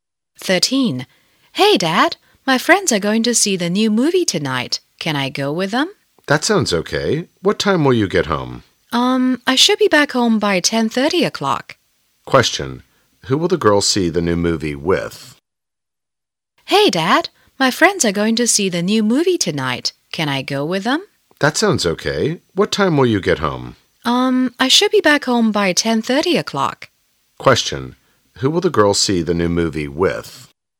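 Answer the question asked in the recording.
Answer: Her friends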